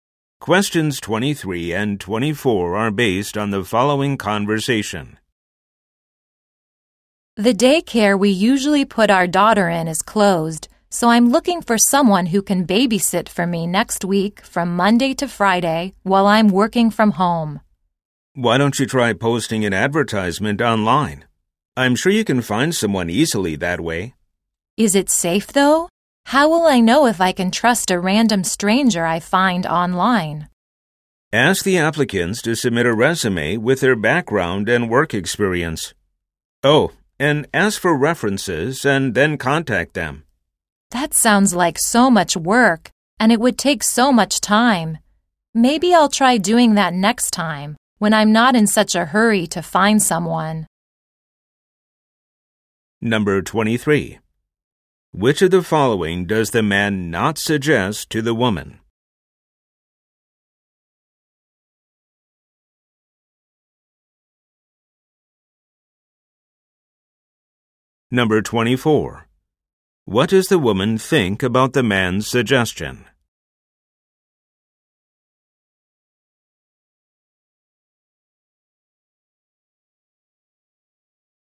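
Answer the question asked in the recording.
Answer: It would take too much work and time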